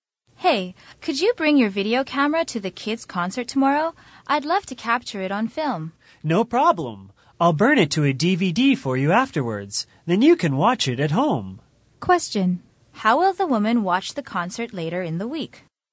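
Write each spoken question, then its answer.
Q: How will the woman watch the concert later in the week?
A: On a DVD at home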